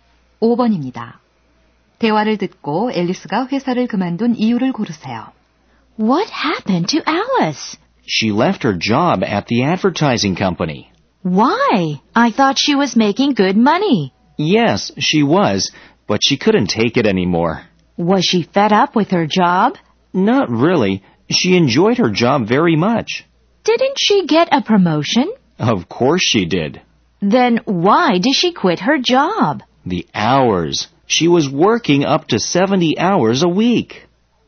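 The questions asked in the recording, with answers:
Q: 대화를 듣고 앨리스가 회사를 그만둔 이유를 고르세요.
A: 근무 시간이 너무 길어서 (주 70시간)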